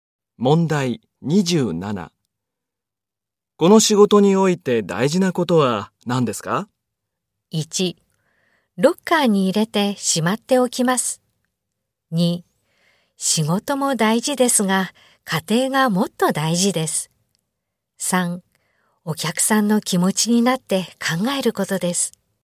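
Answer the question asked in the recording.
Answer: 3: お客さんの気持ちになって考えることです。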